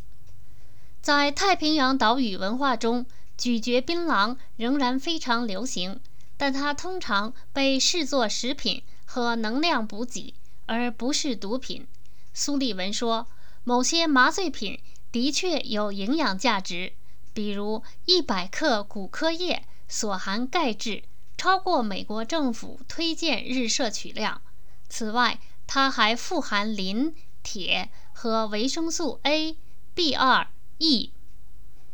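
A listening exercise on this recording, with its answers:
古柯叶有什么营养价值?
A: 100克所含钙质超过美国政府推荐日摄取量,还富含磷、铁和维生素A、B2、E

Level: 3rd Year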